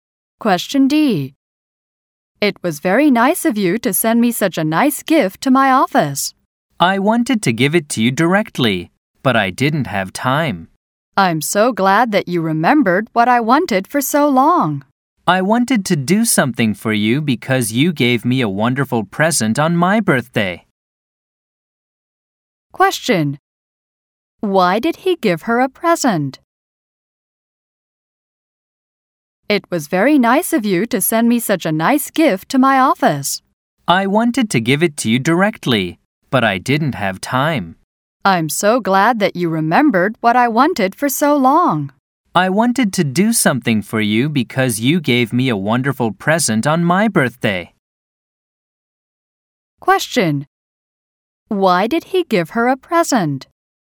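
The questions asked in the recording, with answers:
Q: Why did he give her a present?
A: Because she gave him a wonderful birthday present.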